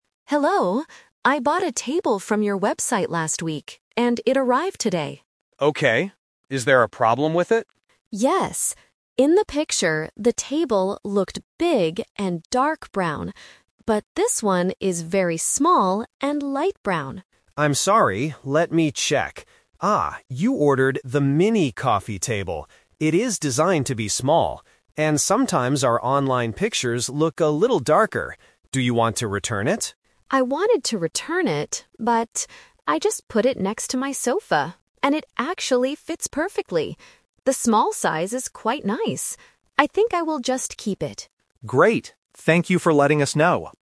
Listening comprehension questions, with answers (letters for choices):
Listen to the conversation and choose the correct answer (A, B, or C).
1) What is the customer's problem with the table?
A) It is too big and dark.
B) It is broken.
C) It is very small and light.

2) Why is the table small?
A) The customer ordered the "Mini Coffee Table".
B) The agent sent the wrong table.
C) It is a table for children.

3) What does the customer decide to do in the end?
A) She decides to return the table.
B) She decides to keep the table.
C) She decides to buy a new sofa.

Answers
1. C
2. A
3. B

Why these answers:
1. The customer complains that the table she got "is very small and light brown." Option A is a trap because "big and dark" is how the table looked in the picture, not in reality. Option B is a plausible problem for online shopping, but it is not mentioned in the audio.
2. The agent checks the order and explains, "you ordered the 'Mini Coffee Table'. It is designed to be small." Option B is a trap because people often receive the wrong item when shopping online, but here, she received exactly what she ordered. Option C is not mentioned.
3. This question uses the "Twist" technique. The customer originally wanted to return the table because it didn't look like the picture. However, after putting it next to her sofa, she realizes it fits perfectly. She changes her mind and says, "I think I will just keep it." Option A is the main trap (what she wanted to do at first). Option C uses the word "sofa" to trick the listener, but she is not buying a sofa.

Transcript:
Customer: Hello. I bought a table from your website last week, and it arrived today.
Agent: Okay. Is there a problem with it?
Customer: Yes. In the picture, the table looked big and dark brown. But this one is very small and light brown.
Agent: I'm sorry. Let me check... Ah, you ordered the "Mini Coffee Table". It is designed to be small. And sometimes our online pictures look a little darker. Do you want to return it?
Customer: I wanted to return it, but... I just put it next to my sofa, and it actually fits perfectly. The small size is quite nice. I think I will just keep it.